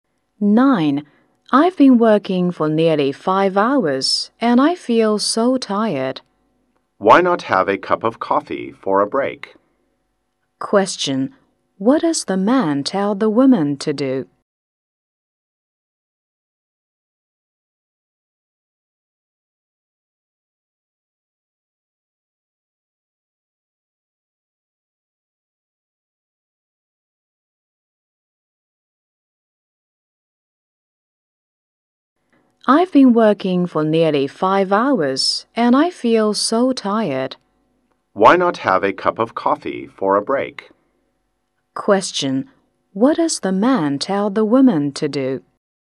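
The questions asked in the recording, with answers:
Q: Question. What does the man tell the woman to do?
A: Have a cup of coffee for a break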